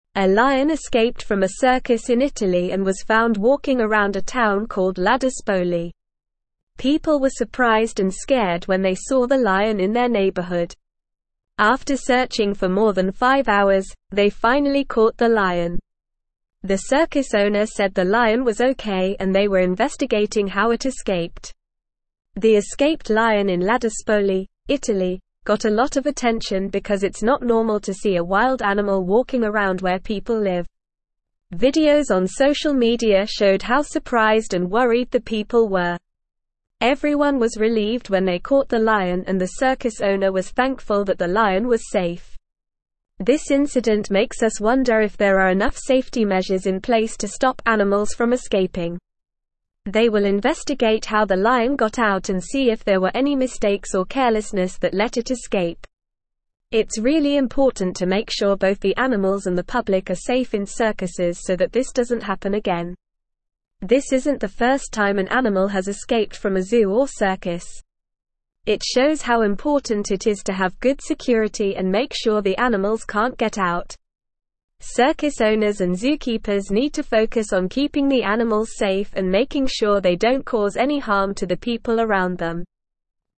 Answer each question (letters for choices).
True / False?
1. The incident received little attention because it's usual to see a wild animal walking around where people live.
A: False

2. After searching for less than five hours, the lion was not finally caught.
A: False

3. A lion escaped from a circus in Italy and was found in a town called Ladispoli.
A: True

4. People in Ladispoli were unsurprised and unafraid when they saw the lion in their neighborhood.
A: False

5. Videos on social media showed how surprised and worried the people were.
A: True

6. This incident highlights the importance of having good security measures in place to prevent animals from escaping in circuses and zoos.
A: True

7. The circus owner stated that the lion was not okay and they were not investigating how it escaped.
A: False

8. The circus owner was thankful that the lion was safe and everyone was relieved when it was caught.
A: True

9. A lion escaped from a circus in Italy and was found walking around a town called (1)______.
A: Ladispoli

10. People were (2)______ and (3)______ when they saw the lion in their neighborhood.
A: surprised

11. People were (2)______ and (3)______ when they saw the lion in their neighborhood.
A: scared

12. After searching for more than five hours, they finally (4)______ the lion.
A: caught

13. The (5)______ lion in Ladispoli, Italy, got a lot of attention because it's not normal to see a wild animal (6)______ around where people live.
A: escaped

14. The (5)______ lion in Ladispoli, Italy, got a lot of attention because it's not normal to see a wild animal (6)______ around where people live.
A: walking

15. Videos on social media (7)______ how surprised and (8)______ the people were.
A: showed

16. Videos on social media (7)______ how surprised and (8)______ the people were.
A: worried

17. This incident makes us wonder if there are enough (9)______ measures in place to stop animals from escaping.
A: safety

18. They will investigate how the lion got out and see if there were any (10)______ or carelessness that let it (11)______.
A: mistakes

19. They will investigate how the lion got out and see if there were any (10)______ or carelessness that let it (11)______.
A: escape

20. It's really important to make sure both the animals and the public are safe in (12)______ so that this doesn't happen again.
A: circuses

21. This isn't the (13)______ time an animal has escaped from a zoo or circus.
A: first

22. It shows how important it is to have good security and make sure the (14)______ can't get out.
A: animals

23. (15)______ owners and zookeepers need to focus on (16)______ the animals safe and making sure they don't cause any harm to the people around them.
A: Circus

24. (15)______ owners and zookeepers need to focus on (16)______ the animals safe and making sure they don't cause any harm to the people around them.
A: keeping

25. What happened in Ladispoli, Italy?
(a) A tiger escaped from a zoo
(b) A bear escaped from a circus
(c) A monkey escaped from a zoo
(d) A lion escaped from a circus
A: d

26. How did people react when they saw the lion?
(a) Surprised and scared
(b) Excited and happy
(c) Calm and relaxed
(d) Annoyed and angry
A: a

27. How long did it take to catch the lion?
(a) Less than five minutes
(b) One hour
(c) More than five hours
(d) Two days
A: c

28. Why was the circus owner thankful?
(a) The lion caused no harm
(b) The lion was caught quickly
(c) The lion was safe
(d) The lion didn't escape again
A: c

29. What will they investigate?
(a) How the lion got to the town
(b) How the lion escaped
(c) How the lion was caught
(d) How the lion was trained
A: b

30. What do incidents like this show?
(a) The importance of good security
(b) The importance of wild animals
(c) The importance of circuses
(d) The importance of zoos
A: a

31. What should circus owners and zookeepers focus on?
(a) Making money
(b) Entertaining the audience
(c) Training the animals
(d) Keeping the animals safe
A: d

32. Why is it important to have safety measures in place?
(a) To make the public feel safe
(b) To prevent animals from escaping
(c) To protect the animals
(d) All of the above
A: b

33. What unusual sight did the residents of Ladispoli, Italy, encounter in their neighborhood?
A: Residents of Ladispoli encountered a lion walking around their neighborhood.

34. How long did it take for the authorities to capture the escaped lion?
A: It took more than five hours to capture the escaped lion.

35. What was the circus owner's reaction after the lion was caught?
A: The circus owner was thankful that the lion was safe and said they were investigating how it escaped.

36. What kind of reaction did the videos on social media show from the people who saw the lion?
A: The videos showed that people were surprised and worried when they saw the lion.

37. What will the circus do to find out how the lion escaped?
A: The circus will investigate to find out how the lion escaped, looking for any mistakes or carelessness.

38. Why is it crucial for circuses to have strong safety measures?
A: It is crucial for circuses to have strong safety measures to prevent animals from escaping and to ensure the safety of both the animals and the public.

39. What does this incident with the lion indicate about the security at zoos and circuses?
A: This incident indicates that there may not be enough security measures in place at zoos and circuses to prevent animals from escaping.

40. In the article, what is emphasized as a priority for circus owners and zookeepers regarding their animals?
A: The article emphasizes that it is a priority for circus owners and zookeepers to keep the animals safe and ensure they do not harm the people around them.

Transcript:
A lion escaped from a circus in Italy and was found walking around a town called Ladispoli. People were surprised and scared when they saw the lion in their neighborhood. After searching for more than five hours, they finally caught the lion. The circus owner said the lion was okay and they were investigating how it escaped.
The escaped lion in Ladispoli, Italy, got a lot of attention because it's not normal to see a wild animal walking around where people live. Everyone was relieved when they caught the lion and the circus owner was thankful that the lion was safe.
This incident makes us wonder if there are enough safety measures in place to stop animals from escaping. They will investigate how the lion got out and see if there were any mistakes or carelessness that let it escape. It's really important to make sure both the animals and the public are safe in circuses so that this doesn't happen again.
This isn't the first time an animal has escaped from a zoo or circus. It shows how important it is to have good security and make sure the animals can't get out. Circus owners and zookeepers need to focus on keeping the animals safe and making sure they don't cause any harm to the people around them.

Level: Level 3